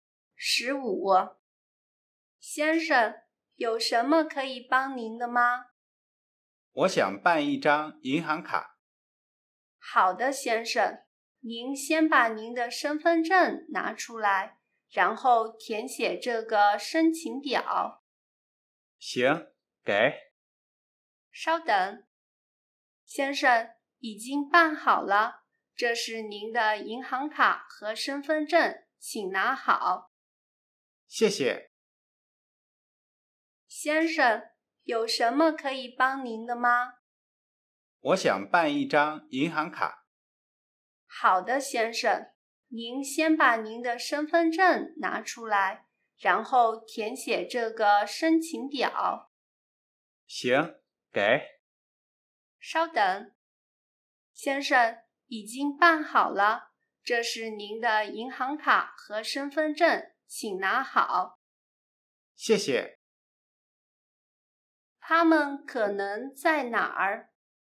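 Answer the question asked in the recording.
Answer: 银行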